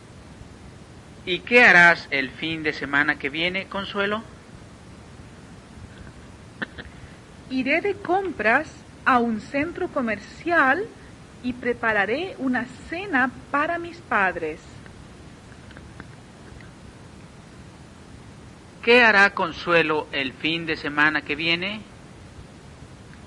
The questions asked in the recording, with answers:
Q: ¿Qué hará Consuelo el fin de semana que viene?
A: Consuelo irá de compras en el centro comercial y preparará una cena para sus padres.